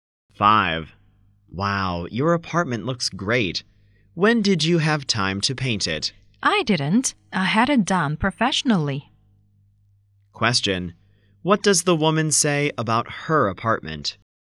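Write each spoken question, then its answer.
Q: What does the woman say about her apartment?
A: She had it painted by professionals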